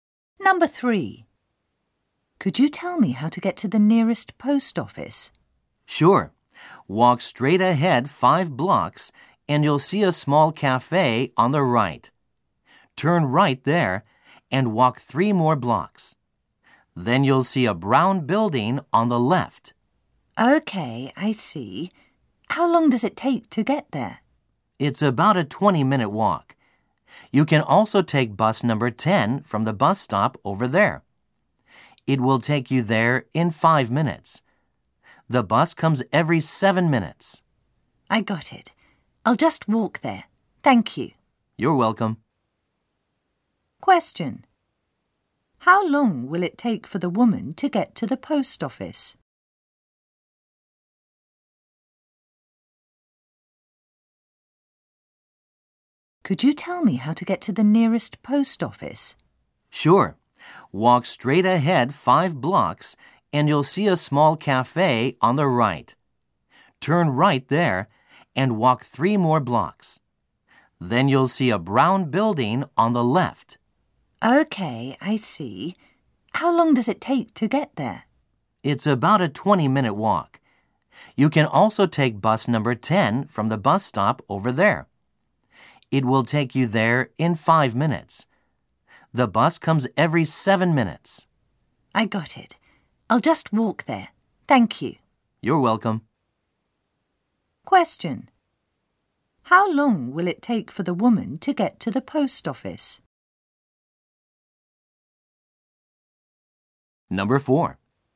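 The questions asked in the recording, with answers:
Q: How long will it take for the woman to get to the post office?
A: About 20 minutes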